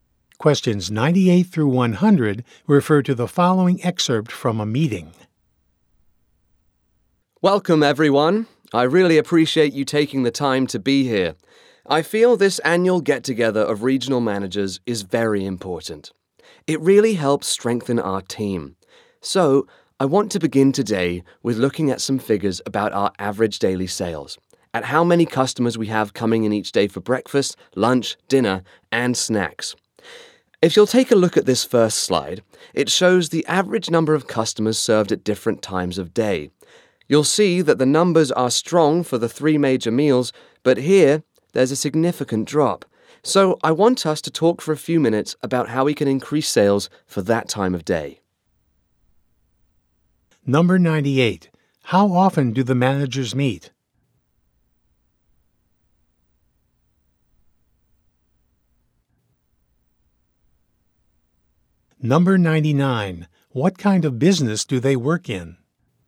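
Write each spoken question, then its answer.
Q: How often do the managers meet?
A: Once a year

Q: What kind of business do they work in?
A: Restaurants/food service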